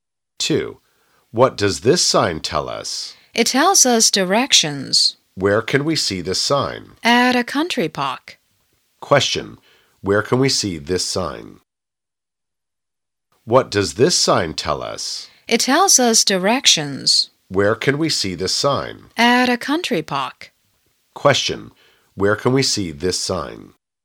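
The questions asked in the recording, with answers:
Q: Question, where can we see this sign?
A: At a country park.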